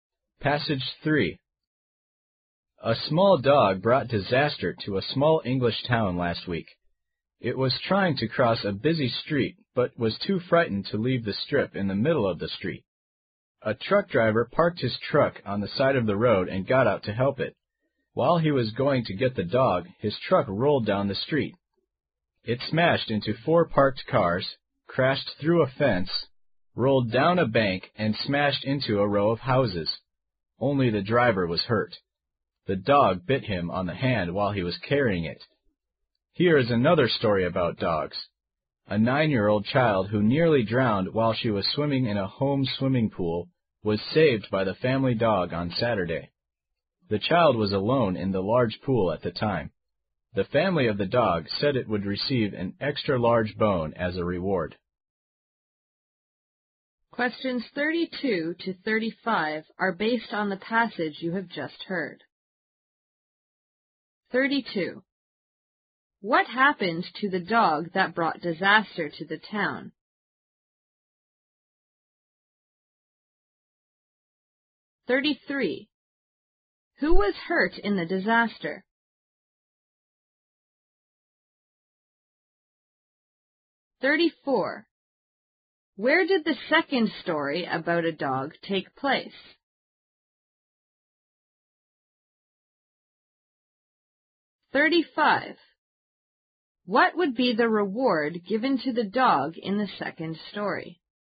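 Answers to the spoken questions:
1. It was too frightened to leave the strip in the middle of the street
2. The truck driver
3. In a home swimming pool
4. An extra-large bone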